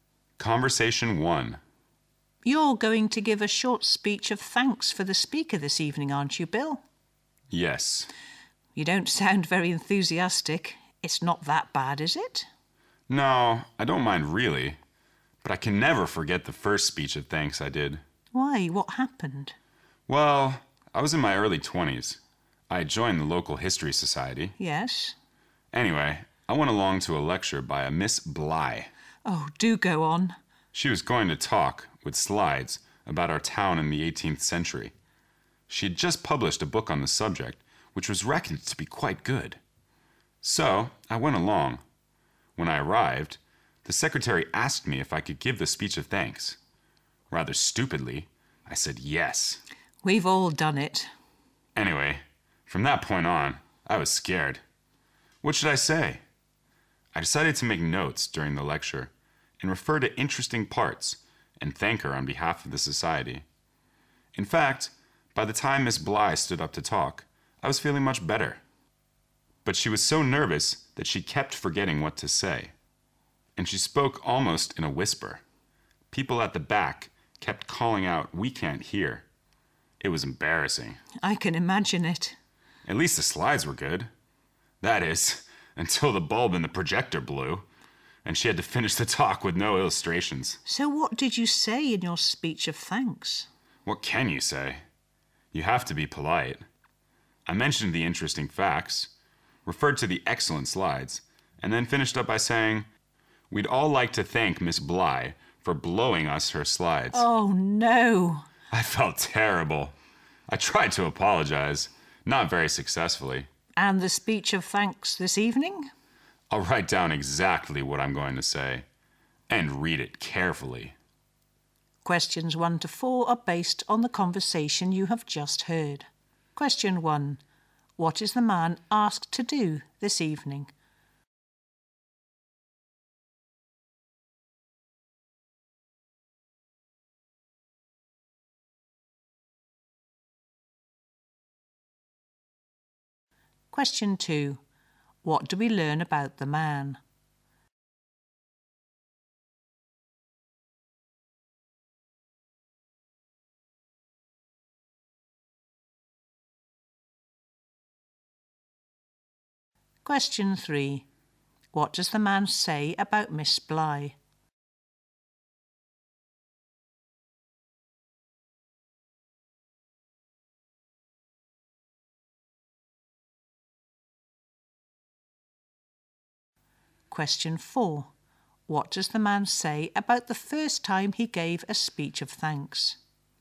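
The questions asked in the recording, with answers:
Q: What is the man asked to do this evening?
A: Give a short speech of thanks for the speaker

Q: What does the man say about Miss Bly?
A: She was so nervous she kept forgetting what to say and spoke almost in a whisper

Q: What does the man say about the first time he gave a speech of thanks?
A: He made an embarrassing slip, thanking Miss Bly for "blowing us her slides"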